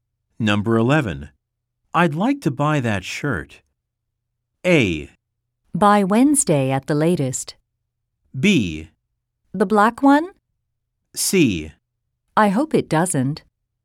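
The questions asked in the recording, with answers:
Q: I'd like to buy that shirt.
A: B: The black one?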